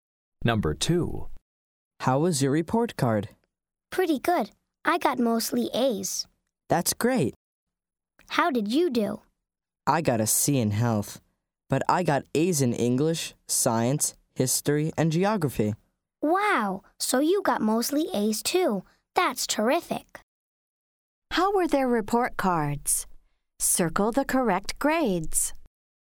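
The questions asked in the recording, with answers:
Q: How were their report cards?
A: mostly A's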